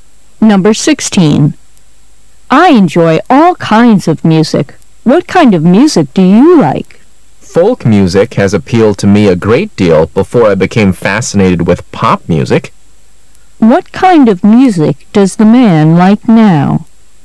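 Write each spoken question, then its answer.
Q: What kind of music does the man like now?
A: Pop music.

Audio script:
M: I'll do anything to see it. Q: What does the man mean?
[解析] W:I enjoy all kinds of music.What kind of music do you like? M: Folk music has appealed to me a great deal before I became fascinated with pop music. Q: What kind of music does the man like now?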